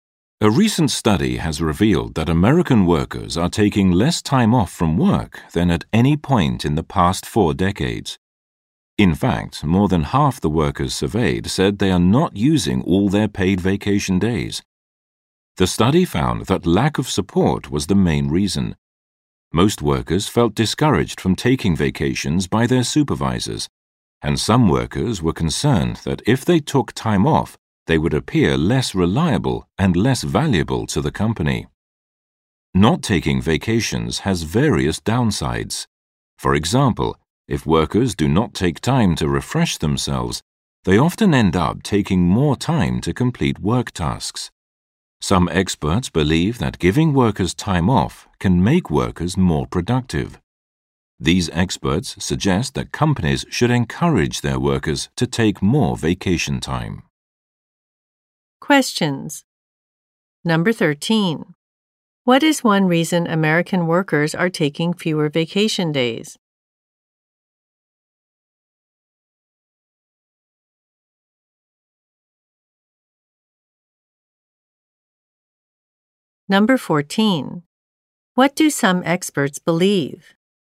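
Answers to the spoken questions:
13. Their supervisors discourage them from taking vacations.
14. Giving workers time off can make them more productive.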